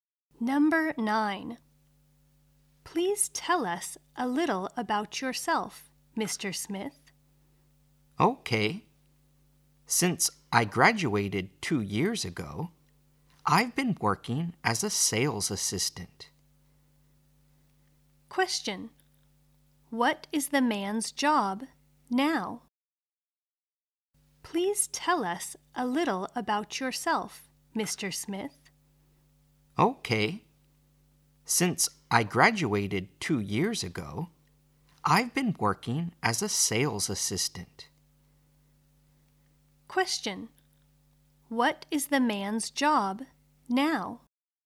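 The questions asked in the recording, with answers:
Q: What is the man's job now?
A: A sales assistant.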